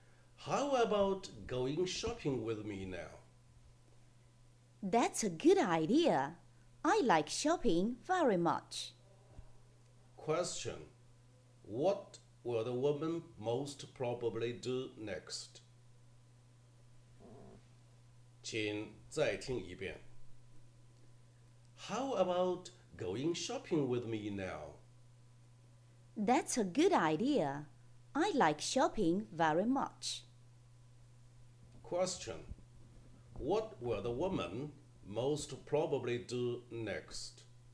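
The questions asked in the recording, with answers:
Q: What will the woman most probably do next.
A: Go shopping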